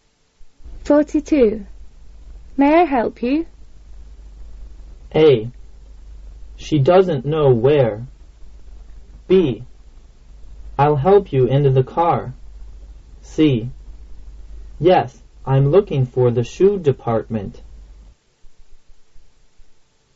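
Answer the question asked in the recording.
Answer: C: Yes, I'm looking for the shoe department.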